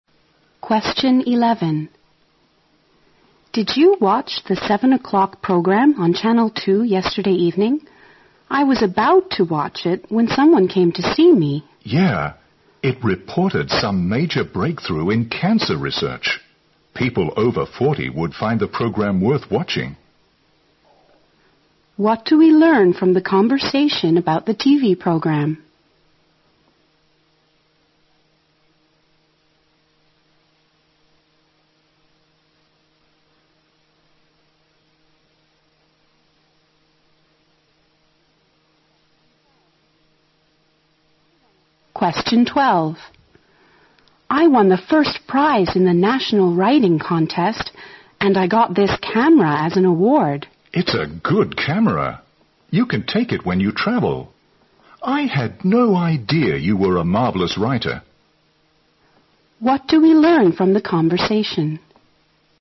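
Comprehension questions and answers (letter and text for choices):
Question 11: What do we learn from the conversation about the TV program?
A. It could help people of all ages to avoid cancer.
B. It was mainly meant for cancer patients.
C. It might appeal more to viewers over 40.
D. It was frequently interrupted by commercials.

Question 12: What do we learn from the conversation?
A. The man is fond of traveling.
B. The woman is a photographer.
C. The woman took a lot of pictures at the contest.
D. The man admires the woman's talent in writing.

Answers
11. C. It might appeal more to viewers over 40.
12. D. The man admires the woman's talent in writing.

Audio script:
W: Did you watch the 7 o* clock program on channel 2 yesterday evening? I was about to watch it when someone came to see me.
M: Yeah! It reported some major breakthrough in cancer research. People over 40 would find the program worth watching.
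Q: What do we learn from the conversation about the TV program?
W: I won a first prize in the National Writing Contest and I got this camera as an awards!
M: It' s a good camera! You can take it when you travel. I had no idea you were a marvelous writer.

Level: 大学英语四级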